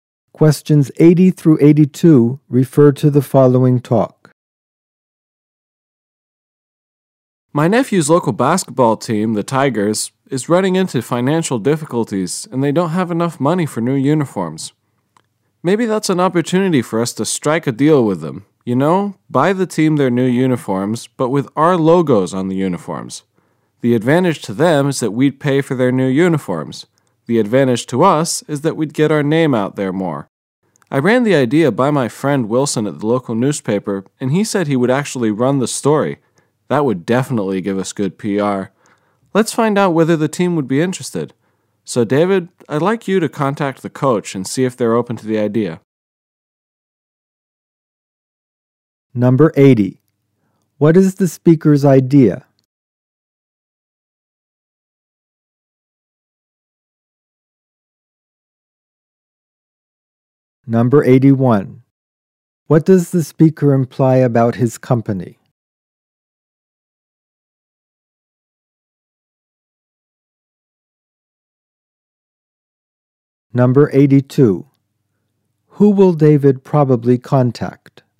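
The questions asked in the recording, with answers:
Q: What is the speaker's idea?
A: Buy the basketball team new uniforms with the company logo

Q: Who will David probably contact?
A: The team's coach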